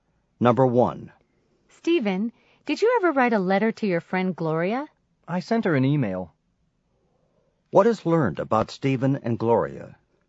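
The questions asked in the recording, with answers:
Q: What is learned about Stephen and Gloria?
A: Stephen contacted Gloria by email instead of a letter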